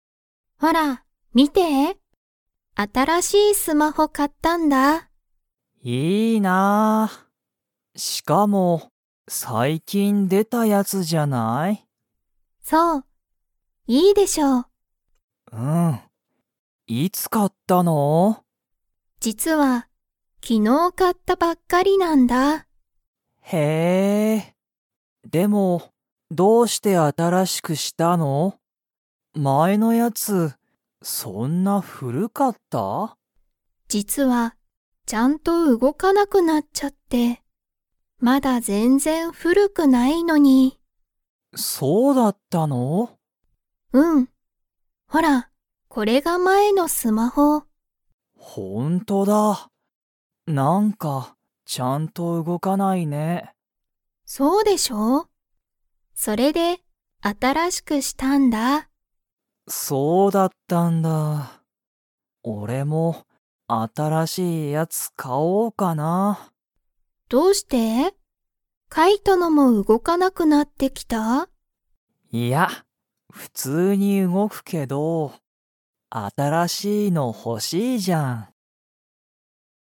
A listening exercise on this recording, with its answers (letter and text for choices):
Comprehension Quiz (Skip if you don't understand the conversation yet)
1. ユリは、スマホをいつ買かいましたか?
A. 一年いちねん前まえ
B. かなり昔むかし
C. 昨日きのう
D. 今日きょう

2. カイトのスマホは 。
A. 普通ふつうに動うごく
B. ちゃんと動うごかない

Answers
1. C. 昨日きのう
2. A. 普通ふつうに動うごく

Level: Level 3